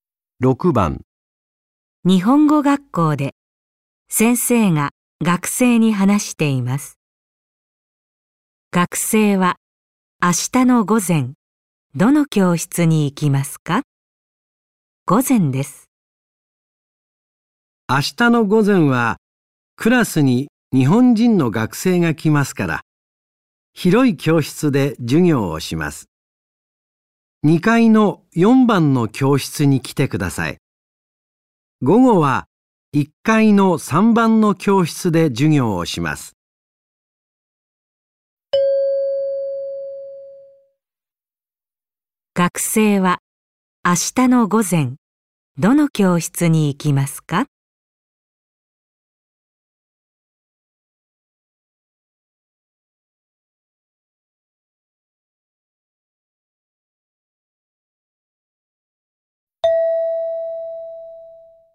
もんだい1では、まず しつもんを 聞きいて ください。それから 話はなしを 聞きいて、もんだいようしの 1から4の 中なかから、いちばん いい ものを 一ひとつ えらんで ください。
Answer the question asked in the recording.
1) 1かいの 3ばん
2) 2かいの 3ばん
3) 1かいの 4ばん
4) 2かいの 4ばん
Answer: 4) 2かいの 4ばん

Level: N5 Listening · Test 1